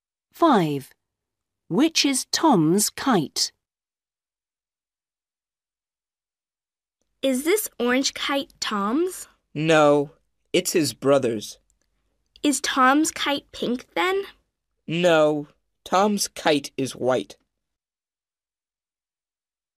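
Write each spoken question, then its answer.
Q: Which is Tom's kite?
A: The white kite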